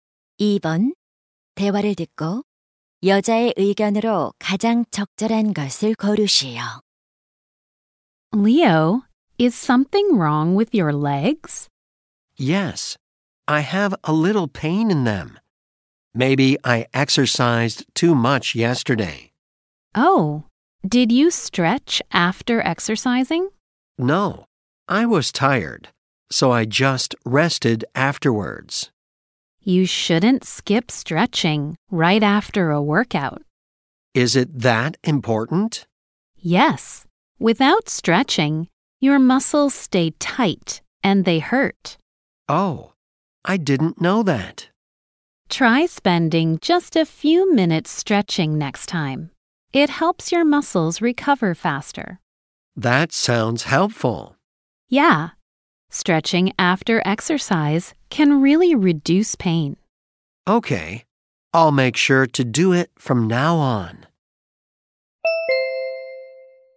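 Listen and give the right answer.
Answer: 운동 후에는 스트레칭을 해야 한다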